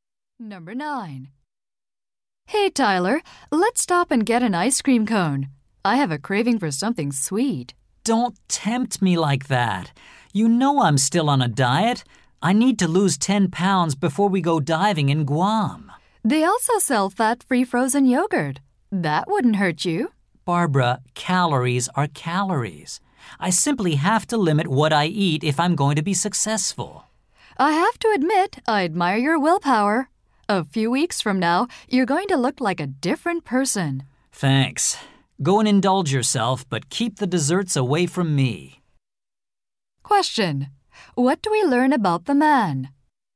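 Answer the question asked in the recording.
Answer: He is on a diet to lose 10 pounds before going diving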